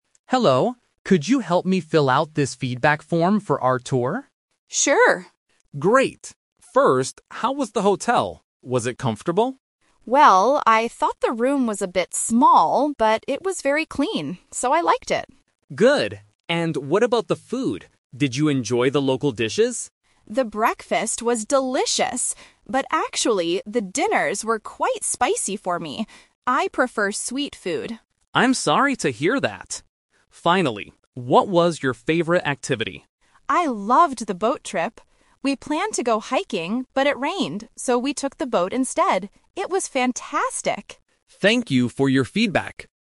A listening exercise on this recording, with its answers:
Listen to a conversation between a tour guide and a tourist. Complete the feedback form below. Write ONE WORD for each gap.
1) Hotel room: It was small but very (1) ___________.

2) Food: The breakfast was good, but the dinners were too (2) ___________.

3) Favorite activity: The (3) ___________ trip.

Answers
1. clean
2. spicy
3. boat

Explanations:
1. The tourist says, "...I thought the room was a bit small, but it was very clean." The conjunction "but" helps listeners identify the positive adjective that contrasts with "small".
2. The tourist explicitly states, "the dinners were quite spicy for me." The trap here is the word "sweet", which is the type of food the tourist prefers, not how the dinner actually tasted. "Delicious" is also a trap as it refers to the breakfast.
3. The tourist says, "I loved the boat trip." The trap is the word "hiking", which was their original plan ("We planned to go hiking"), but they changed it because of the rain.

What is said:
Guide: Hello! Could you help me fill out this feedback form for our tour?
Tourist: Sure.
Guide: Great. First, how was the hotel? Was it comfortable?
Tourist: Well, I thought the room was a bit small, but it was very clean. So, I liked it.
Guide: Good. And what about the food? Did you enjoy the local dishes?
Tourist: The breakfast was delicious! But actually, the dinners were quite spicy for me. I prefer sweet food.
Guide: I'm sorry to hear that. Finally, what was your favorite activity?
Tourist: I loved the boat trip. We planned to go hiking, but it rained, so we took the boat instead. It was fantastic.